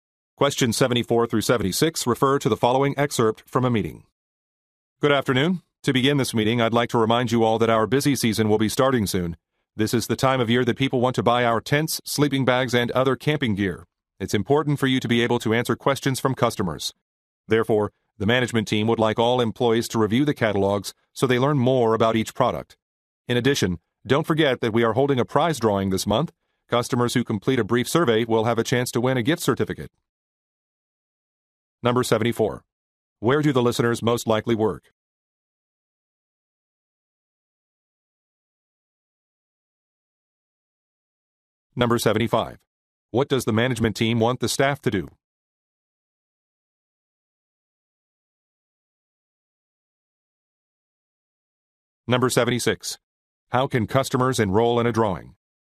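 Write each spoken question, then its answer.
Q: Where do the listeners most likely work?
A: At a camping gear store

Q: What does the management team want the staff to do?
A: Review the product catalogs

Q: How can customers enroll in a drawing?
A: By completing a brief survey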